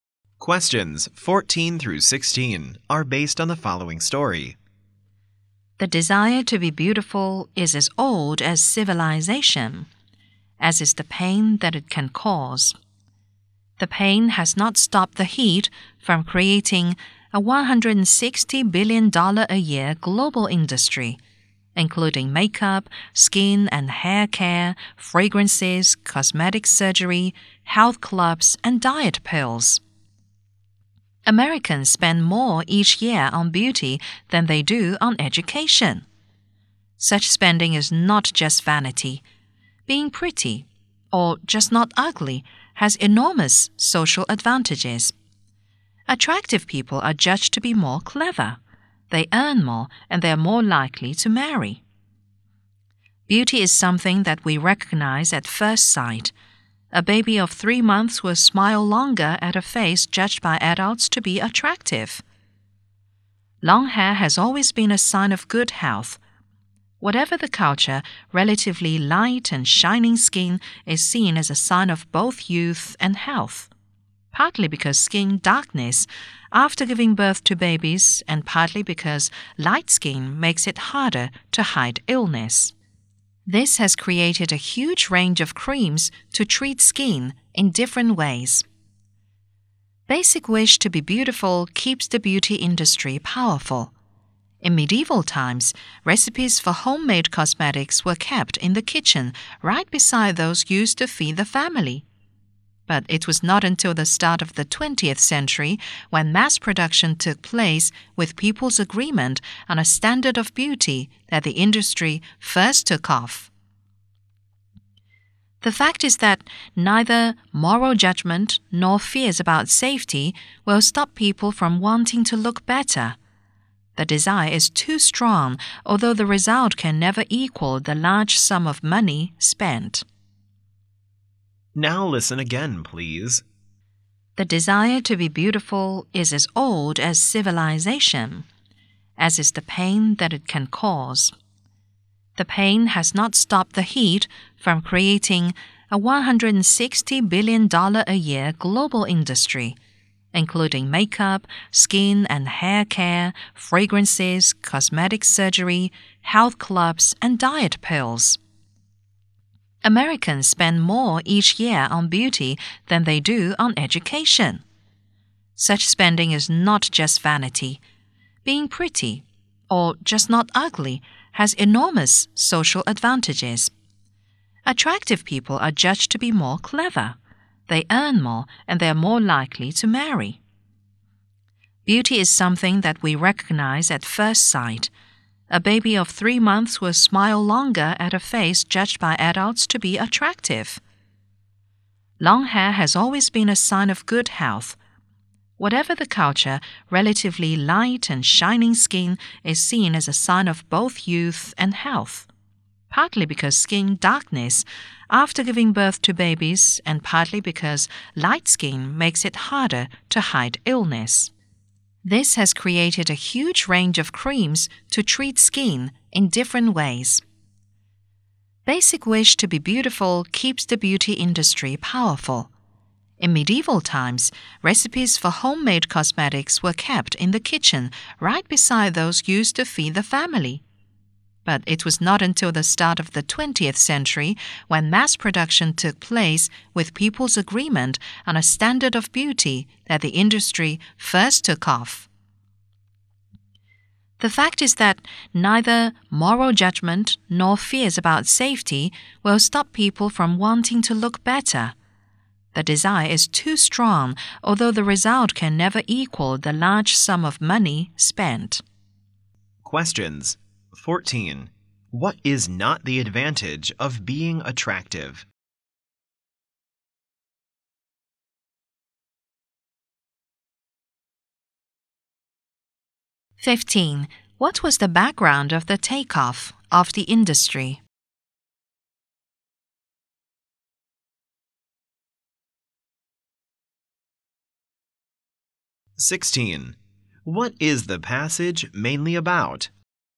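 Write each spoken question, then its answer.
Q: What was the background of the takeoff of the industry?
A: Mass production and people's agreement on a standard of beauty in the early 20th century

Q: What is the passage mainly about?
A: People's desire to be beautiful and the beauty industry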